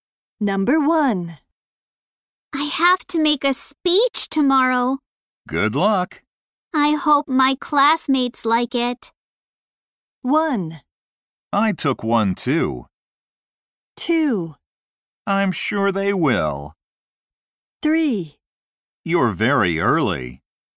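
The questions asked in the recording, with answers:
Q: I hope my classmates like it.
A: 2: I'm sure they will.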